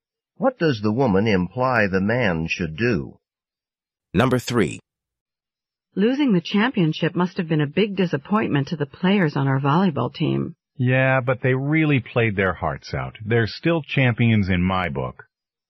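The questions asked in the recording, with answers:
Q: What does the man mean?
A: He thinks the team did well even though it lost.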